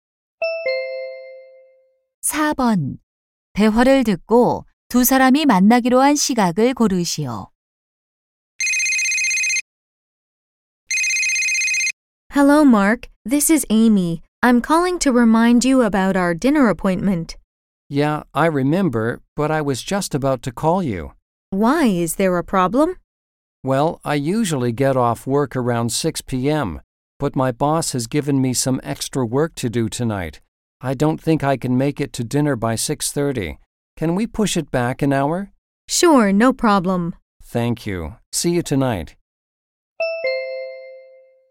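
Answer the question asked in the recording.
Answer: 7시 30분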